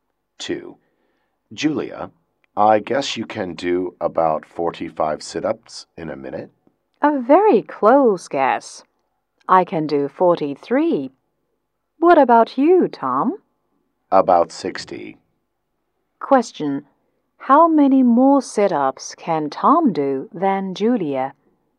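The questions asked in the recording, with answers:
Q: How many more sit-ups can Tom do than Julia?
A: About 17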